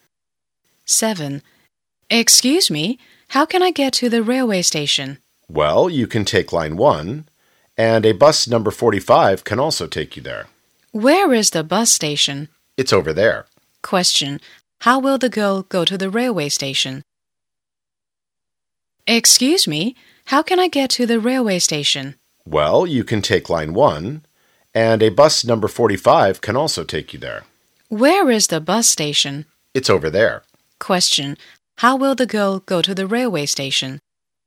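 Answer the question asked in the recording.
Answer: By bus (No. 45)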